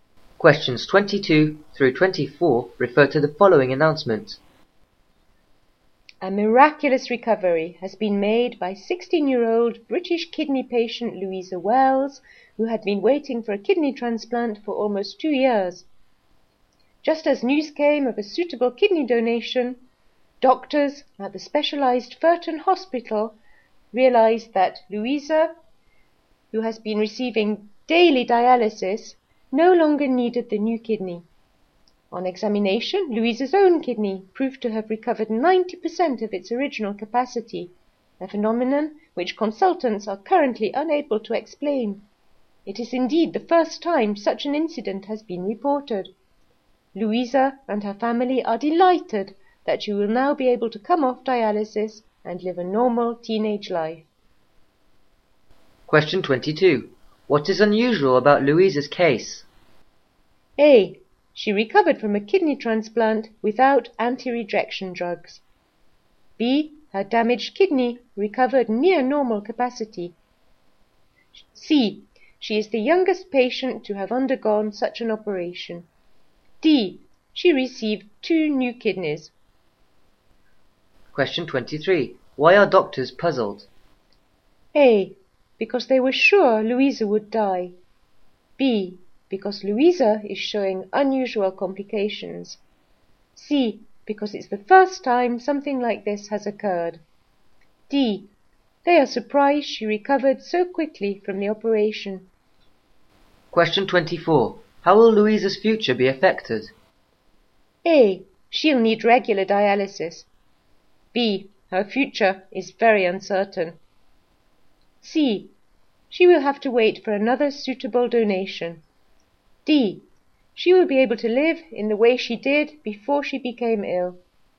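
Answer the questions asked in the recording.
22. B: Her damaged kidney recovered near normal capacity.
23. C: Because it's the first time something like this has occurred.
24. D: She will be able to live in the way she did before she became ill.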